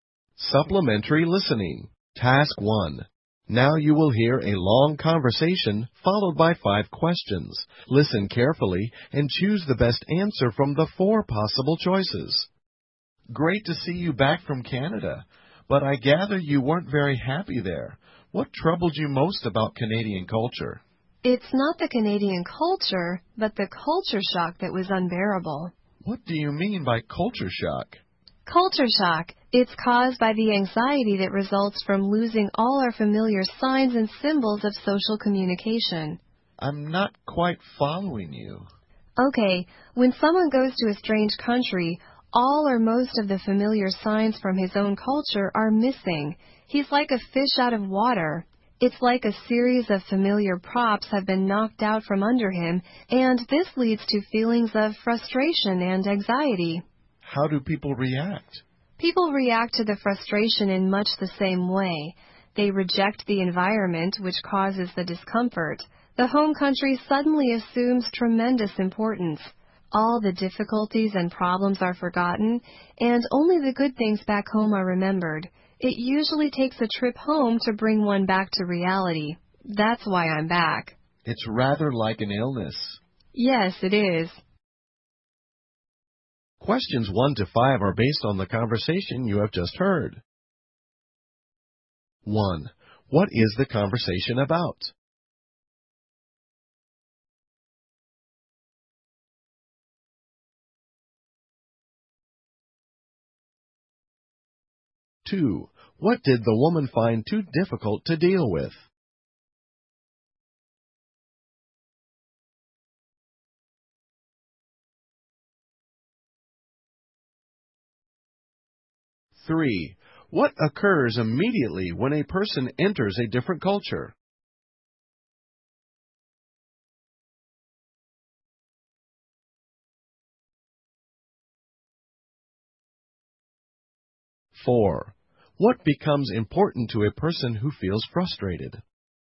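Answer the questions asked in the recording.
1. Culture shock
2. Culture shock
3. The familiar signs of his own culture are missing
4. The home country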